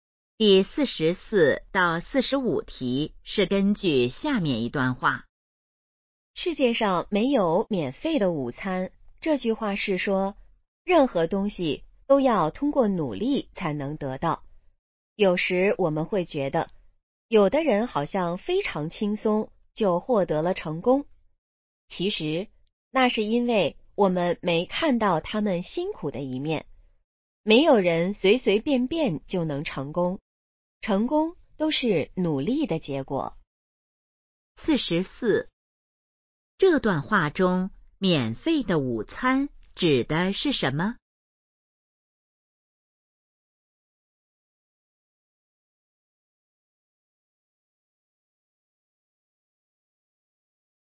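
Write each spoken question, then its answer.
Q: 这段话中,免费的午餐指的是什么?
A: 不通过努力就能得到的东西

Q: 这段话主要想告诉我们什么?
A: 成功要靠努力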